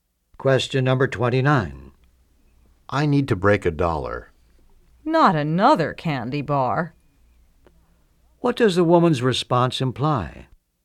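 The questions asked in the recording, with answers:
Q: What does the woman's response imply?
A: The man wants change to buy another candy bar.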